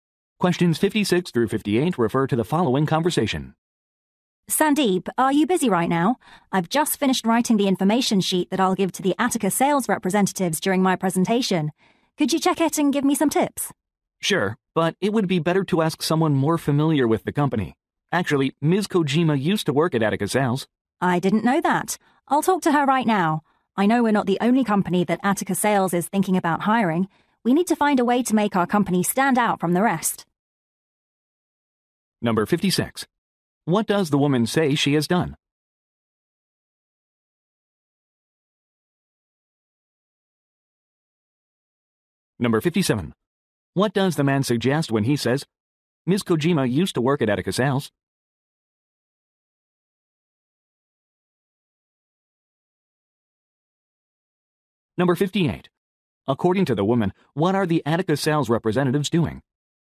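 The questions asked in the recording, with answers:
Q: What does the woman say she has done?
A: Written an information sheet

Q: What does the man suggest when he says, "Ms. Kojima used to work at Attica Sales"?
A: Ms. Kojima should check the sheet

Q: According to the woman, what are the Attica sales representatives doing?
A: Considering hiring several companies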